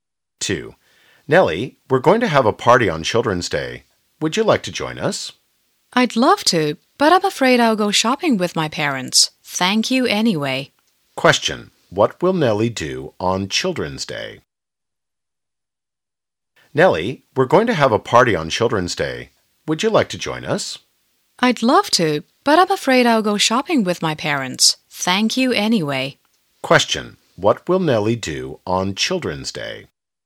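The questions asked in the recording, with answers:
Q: What will Nellie do on Children's Day?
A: Go shopping with her parents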